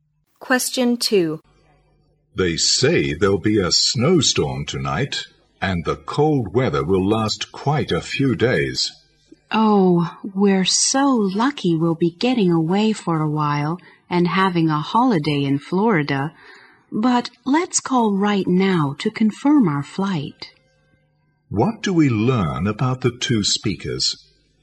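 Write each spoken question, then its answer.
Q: What do we learn about the 2 speakers?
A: They are going on holiday in Florida and will miss the snowstorm.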